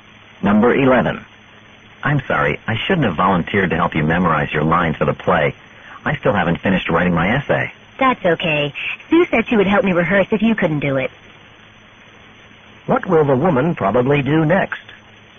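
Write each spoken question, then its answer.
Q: What will the woman probably do next?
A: Ask Sue to help her rehearse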